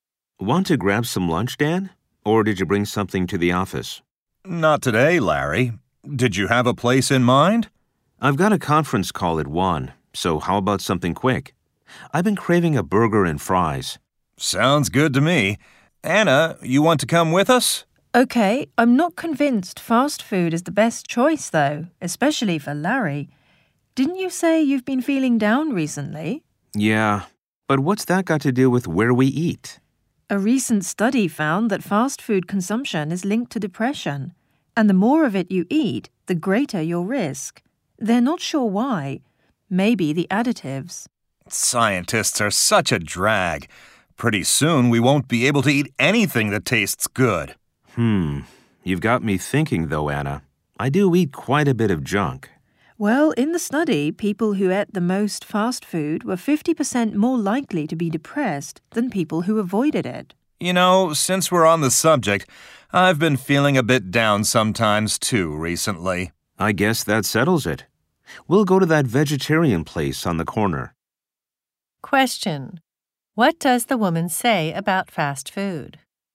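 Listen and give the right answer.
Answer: Eating it is linked to depression; the more you eat, the greater the risk.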